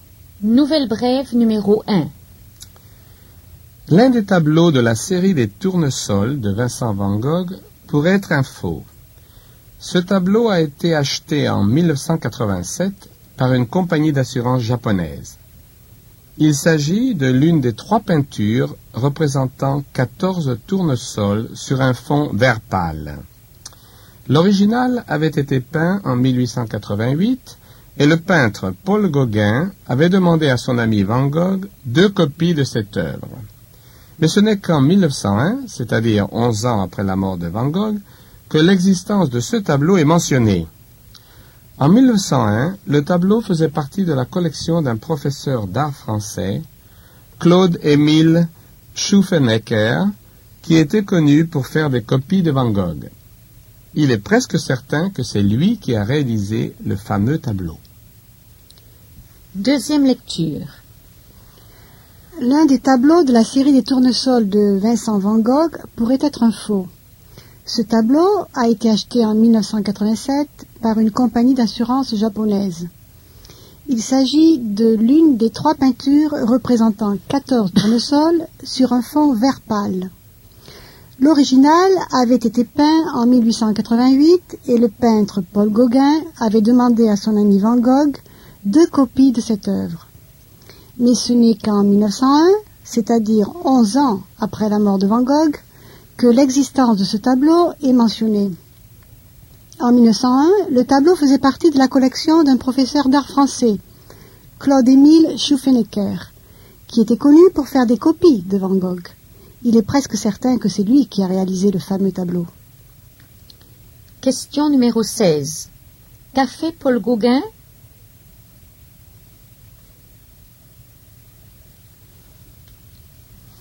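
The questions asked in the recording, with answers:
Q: Qu'a fait Paul Gauguin ?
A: Il a demandé à Van Gogh deux copies du tableau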